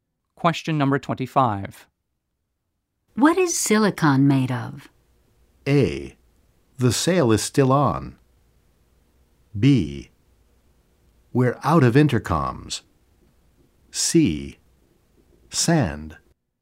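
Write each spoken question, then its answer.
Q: What is silicon made of?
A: C: Sand.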